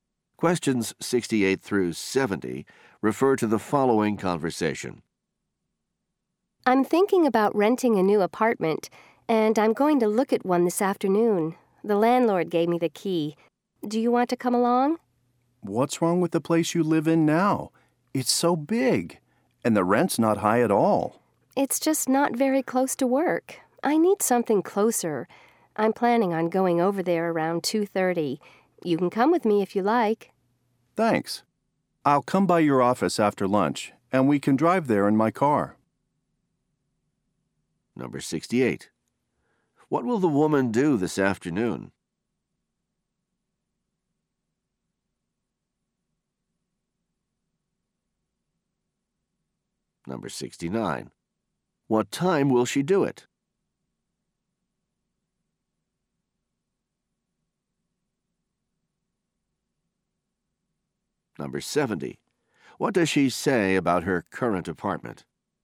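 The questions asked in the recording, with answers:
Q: What will the woman do this afternoon?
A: Look at an apartment

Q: What time will she do it?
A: Around 2:30

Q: What does she say about her current apartment?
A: It's not close to work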